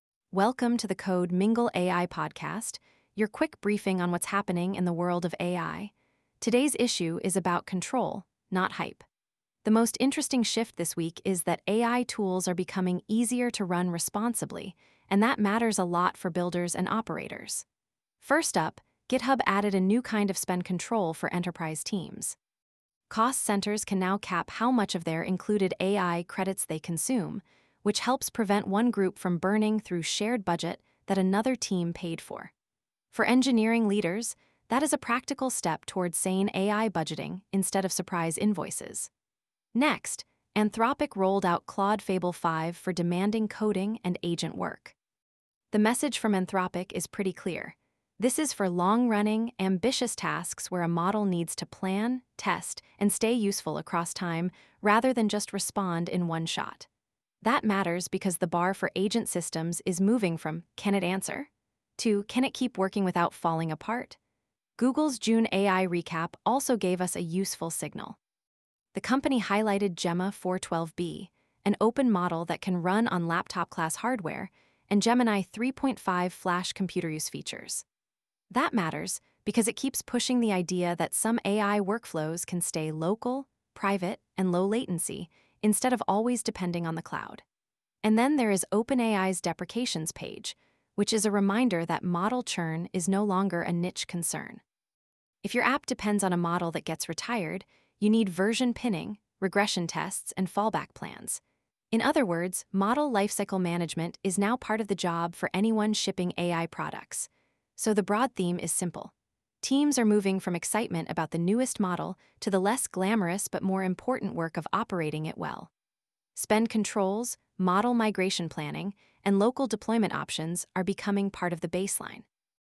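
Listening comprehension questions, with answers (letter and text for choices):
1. What was the most practical AI announcement from GitHub this week?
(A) A new code editor built into the browser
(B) AI credit pools for cost centers to cap included usage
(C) A new open-source LLM benchmark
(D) A complete replacement for Copilot Chat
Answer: (B) AI credit pools for cost centers to cap included usage

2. Why is Anthropic's Claude Fable 5 notable for developers?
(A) It is only available for image generation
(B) It targets long-running coding and agent tasks with frontier-level capability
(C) It replaces all model routing needs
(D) It requires no guardrails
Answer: (B) It targets long-running coding and agent tasks with frontier-level capability

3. What does Google's June recap suggest about deployment strategy?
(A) All work should stay in the cloud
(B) Local and hybrid inference are becoming practical for developers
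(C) Hardware requirements are rising for every new model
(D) Private AI is only possible for large enterprises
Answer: (B) Local and hybrid inference are becoming practical for developers

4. What is the main operational lesson from OpenAI's deprecations update?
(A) Developers should avoid all model pinning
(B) Model deprecations are now a product operations concern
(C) Only consumer apps need migration plans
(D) Pricing is the only thing that matters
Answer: (B) Model deprecations are now a product operations concern

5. Which operating pattern best fits this week's AI trend?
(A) Use one giant cloud model for everything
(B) Pair strong controls with a small number of well-routed models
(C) Ignore spend limits until usage spikes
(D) Treat every agent task as a fully autonomous black box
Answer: (B) Pair strong controls with a small number of well-routed models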